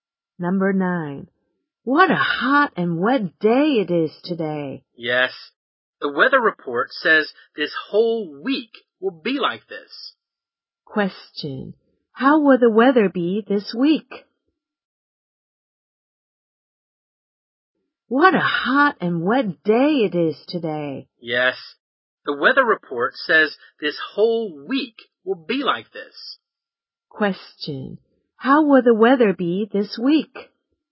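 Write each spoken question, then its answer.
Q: How will the weather be this week?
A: Hot and wet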